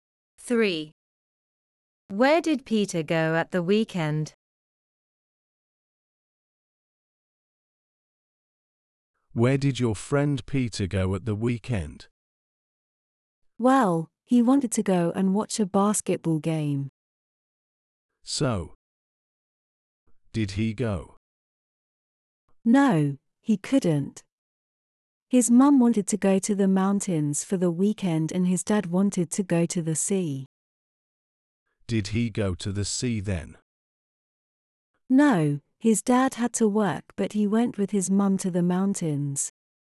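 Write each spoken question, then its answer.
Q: Where did Peter go at the weekend?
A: to the mountains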